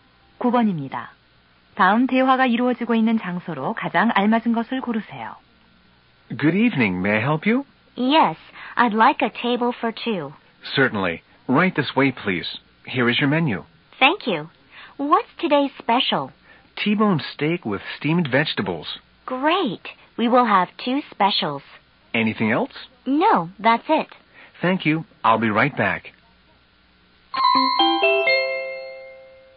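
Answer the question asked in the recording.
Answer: 식당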